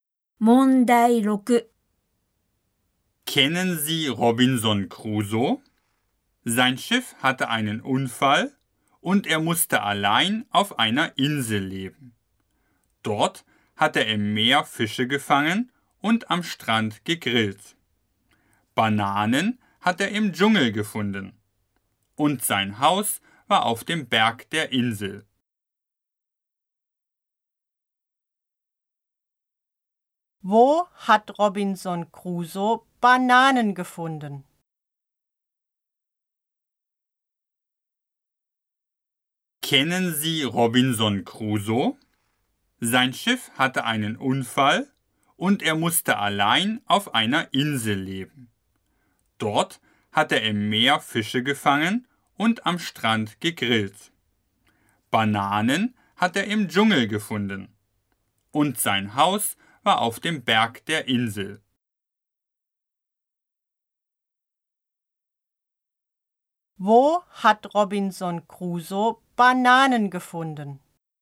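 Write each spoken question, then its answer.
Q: Wo hat Robinson Crusoe Bananen gefunden?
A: Im Dschungel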